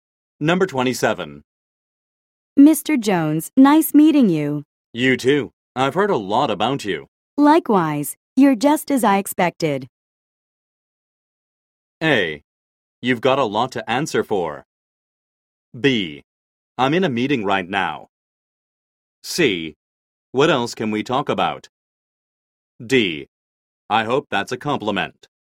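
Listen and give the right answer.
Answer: D: I hope that's a compliment.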